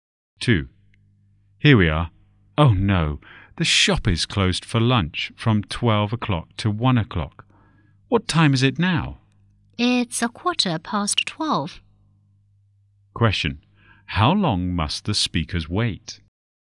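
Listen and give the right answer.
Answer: 45 minutes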